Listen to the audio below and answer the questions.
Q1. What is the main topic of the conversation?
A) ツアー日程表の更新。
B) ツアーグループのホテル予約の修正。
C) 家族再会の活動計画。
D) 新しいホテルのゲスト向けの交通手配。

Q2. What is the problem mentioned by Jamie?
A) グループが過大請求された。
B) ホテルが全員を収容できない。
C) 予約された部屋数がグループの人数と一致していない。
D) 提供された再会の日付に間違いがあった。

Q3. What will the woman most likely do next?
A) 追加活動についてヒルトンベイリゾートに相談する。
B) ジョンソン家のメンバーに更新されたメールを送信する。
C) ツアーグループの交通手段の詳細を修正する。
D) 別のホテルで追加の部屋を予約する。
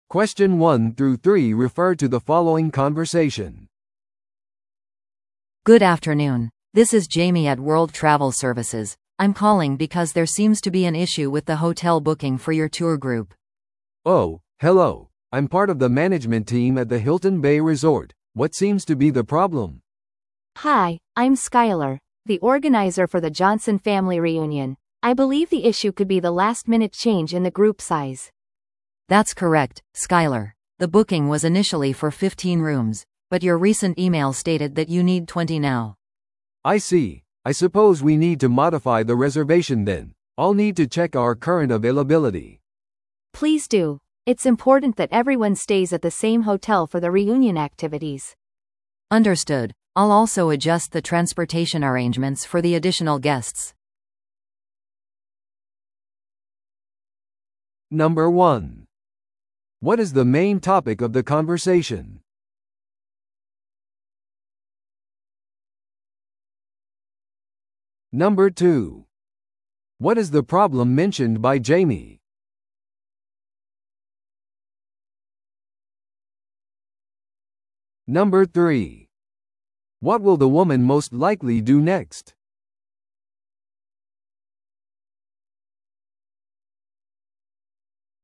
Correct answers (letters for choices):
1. B
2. C
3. C

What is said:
A: Good afternoon, this is Jamie at World Travel Services. I'm calling because there seems to be an issue with the hotel booking for your tour group.
B: Oh, hello. I'm part of the management team at the Hilton Bay Resort. What seems to be the problem?
C: Hi, I'm Skyler, the organizer for the Johnson family reunion. I believe the issue could be the last-minute change in the group size.
A: That's correct, Skyler. The booking was initially for 15 rooms, but your recent email stated that you need 20 now.
B: I see. I suppose we need to modify the reservation then. I'll need to check our current availability.
C: Please do. It's important that everyone stays at the same hotel for the reunion activities.
A: Understood. I'll also adjust the transportation arrangements for the additional guests.